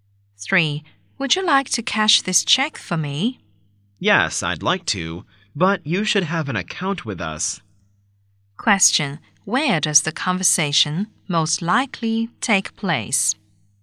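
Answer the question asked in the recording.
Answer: In a bank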